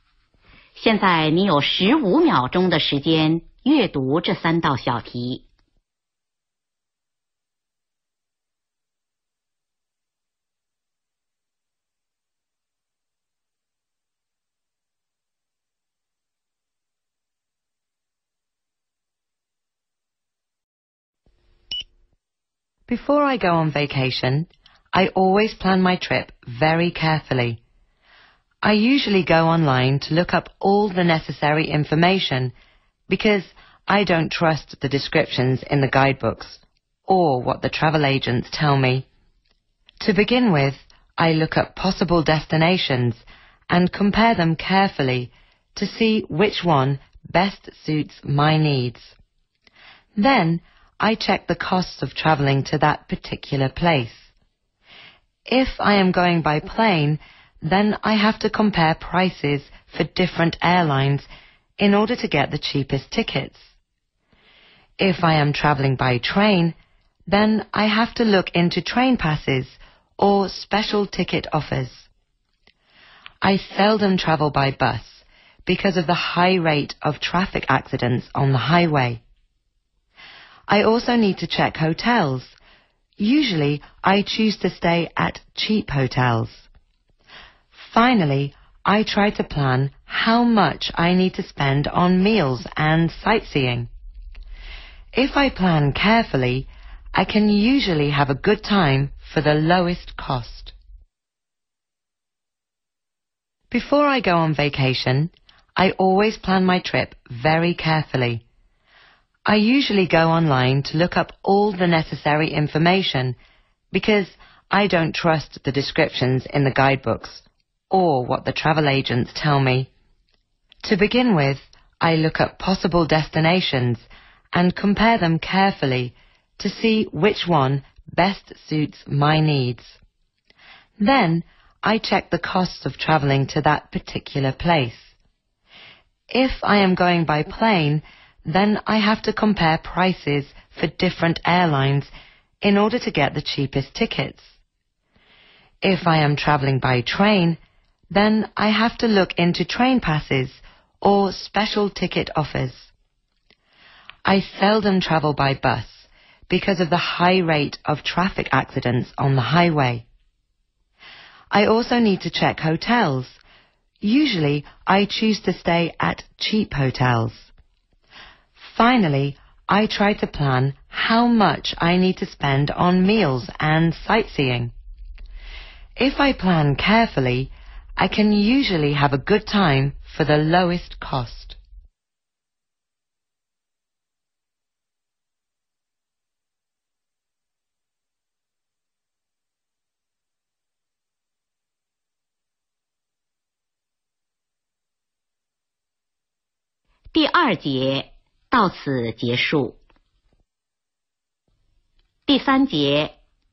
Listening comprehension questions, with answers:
听第 9 段材料,回答第 13 至 15 题。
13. Where does the speaker get information for the trip?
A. The internet.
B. Travel agents.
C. Guidebooks.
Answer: The internet.

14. What public transportation does the speaker seldom take?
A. Planes.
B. Buses.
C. Trains.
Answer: Buses.

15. What kind of hotels does the speaker usually stay in?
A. Hotels with low prices.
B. Hotels providing meals.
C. Hotels near sightseeing places.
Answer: Hotels with low prices.

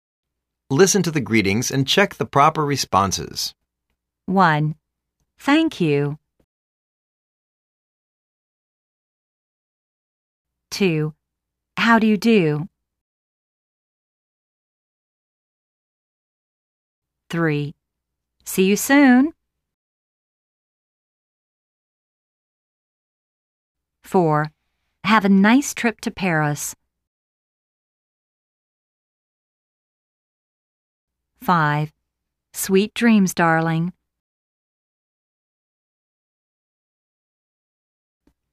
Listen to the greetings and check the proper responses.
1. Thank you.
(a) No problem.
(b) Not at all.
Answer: Not at all.

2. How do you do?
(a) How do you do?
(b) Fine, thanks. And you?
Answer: Fine, thanks. And you?

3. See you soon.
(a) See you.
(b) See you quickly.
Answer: See you.

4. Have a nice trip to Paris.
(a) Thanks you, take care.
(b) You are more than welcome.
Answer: Thanks you, take care.

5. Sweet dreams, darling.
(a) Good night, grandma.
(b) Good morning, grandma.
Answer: Good night, grandma.

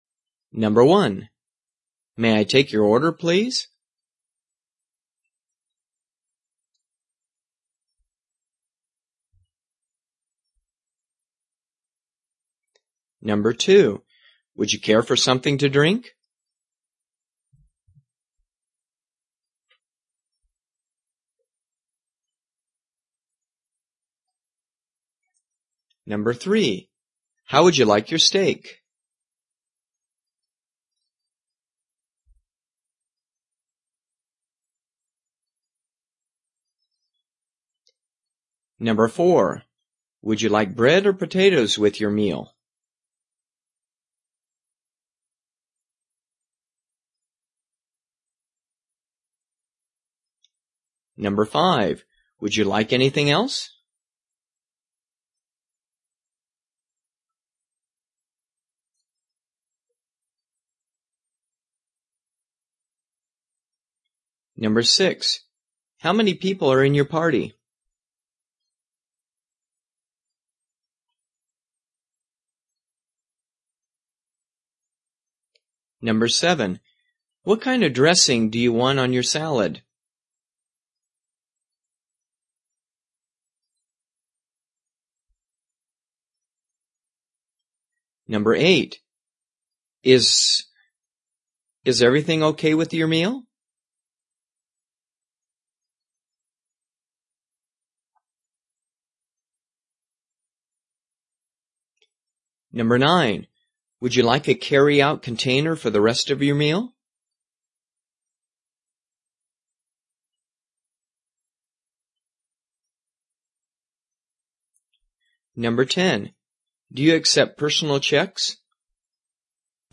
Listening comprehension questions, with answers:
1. May I take ______________ please?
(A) Three people.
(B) That'll be all.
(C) No. We're not ready yet.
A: No. We're not ready yet.

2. Would you _____________ for something to ____________?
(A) A glass of water is fine.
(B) I'll have a piece of apple pie.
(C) French dressing, please.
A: A glass of water is fine.

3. How would you _________________?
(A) T-bone steak, please.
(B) Medium, please.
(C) I'd like rice with my steak.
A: Medium, please.

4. Would you like ____________ or ___________ with your ____________?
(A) I'll have the salad, please.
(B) I'd like the rice.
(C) Bread, please.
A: Bread, please.

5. Would ___________________________?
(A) Yes. I'd like more water.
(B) I didn't order this.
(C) Yes. The food is great.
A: Yes. I'd like more water.

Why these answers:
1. May I take your order please? (No. We're not ready yet.)
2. Would you care for something to drink? (I'll take a large Sprite.)
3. How would you like your steak? (Medium, please.)
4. Would you like bread or potatoes with your meal? (Bread, please.)
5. Would you like anything else? (Yes. I'd like more water.)

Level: 初级

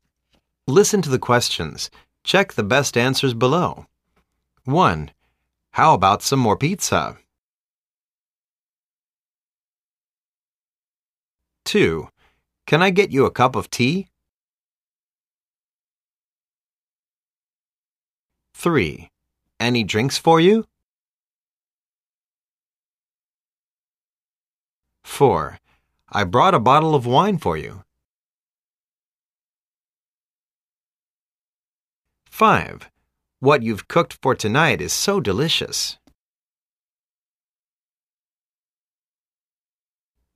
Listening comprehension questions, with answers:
Listen to the questions.Check the best answers below.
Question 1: How about some more pizza?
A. No.Thanks.I'm full.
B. No.You can eat more.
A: No.Thanks.I'm full.

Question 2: Can I get you a cup of tea?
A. Yes,I'm fine.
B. Yes, please.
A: Yes, please.

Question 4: I brought a bottle of wine for you!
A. Thanks a lot. You shouldn't do this!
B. You are welcome!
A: Thanks a lot. You shouldn't do this!

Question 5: What you've cooked for tonight is so delicious!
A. I'm glad to hear it!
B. No problem!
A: I'm glad to hear it!

